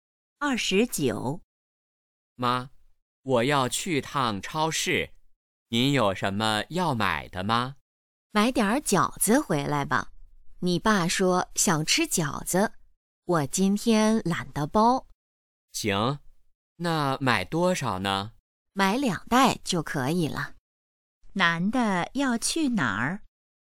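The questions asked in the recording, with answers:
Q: 男的要去哪儿?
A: 超市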